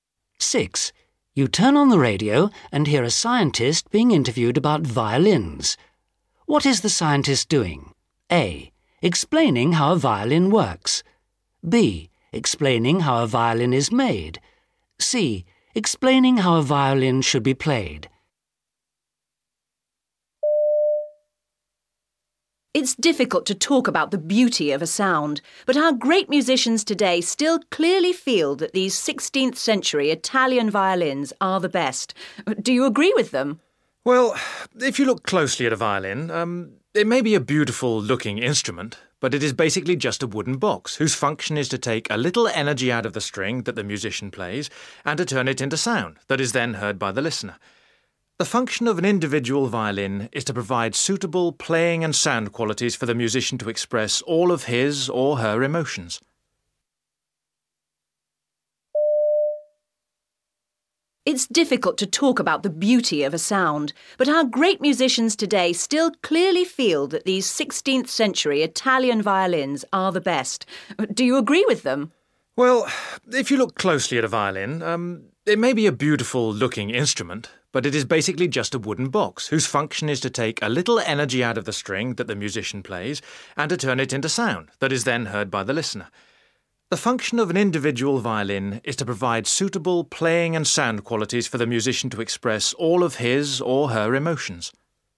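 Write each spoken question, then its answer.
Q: What is the scientist doing?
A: A: Explaining how a violin works.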